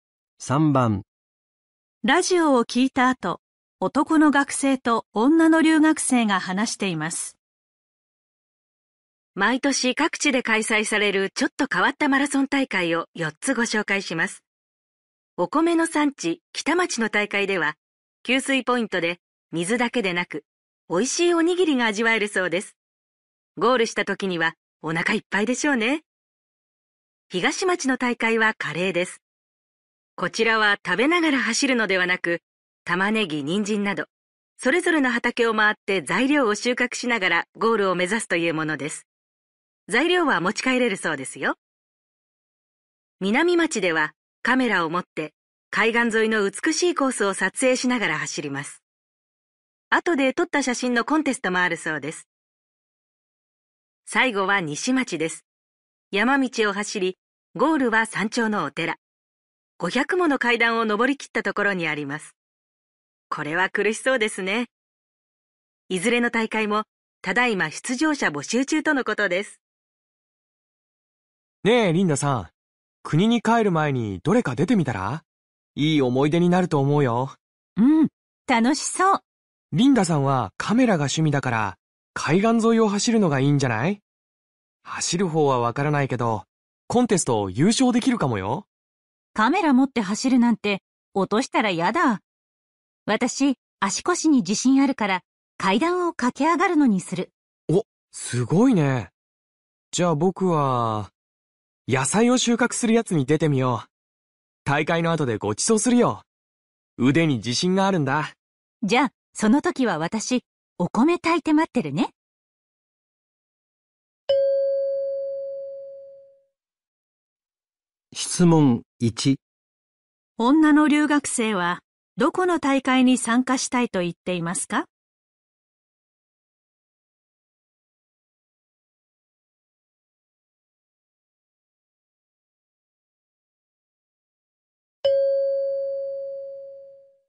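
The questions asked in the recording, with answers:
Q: 女の留学生はどこの大会に参加したいと言っていますか?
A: 西町の大会(山頂のお寺の階段)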